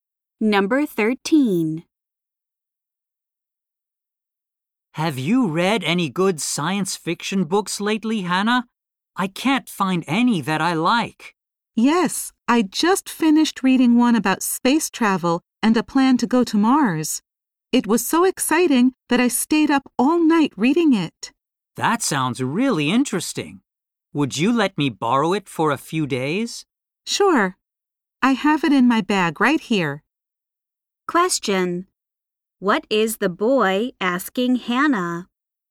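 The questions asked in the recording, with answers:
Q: What is the boy asking Hannah?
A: To lend him her science fiction book.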